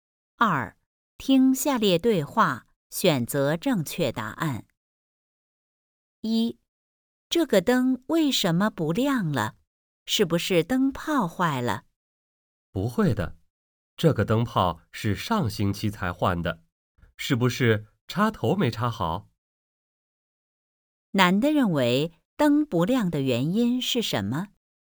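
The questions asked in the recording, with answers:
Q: 男的认为灯不亮的原因是什么?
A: 插头没插好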